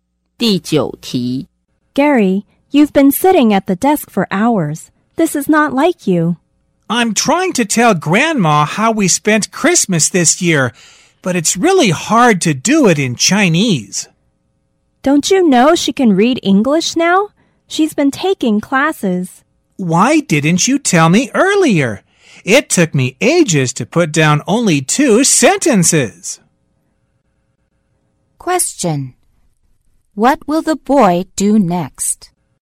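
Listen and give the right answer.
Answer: Write to Grandma in English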